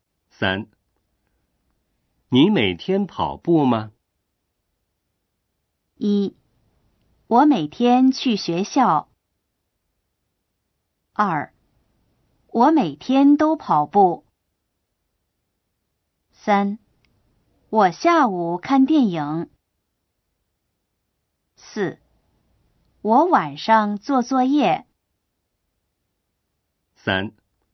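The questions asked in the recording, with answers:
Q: 你每天跑步吗?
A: 2: 我每天都跑步。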